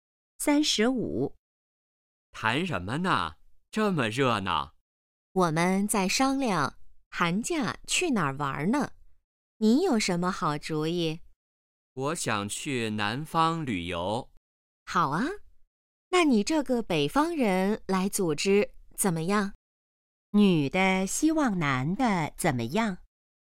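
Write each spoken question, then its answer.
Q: 女的希望男的怎么样?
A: 组织去南方旅游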